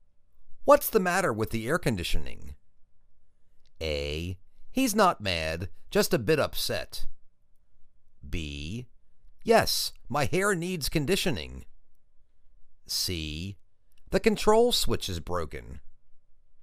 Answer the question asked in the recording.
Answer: The control switch is broken.